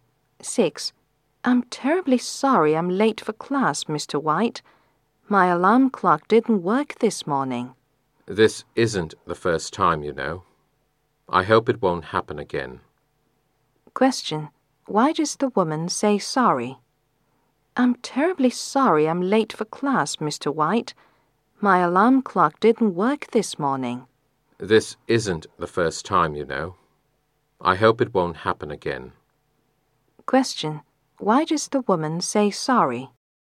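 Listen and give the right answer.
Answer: She is late for class (her alarm clock didn't work)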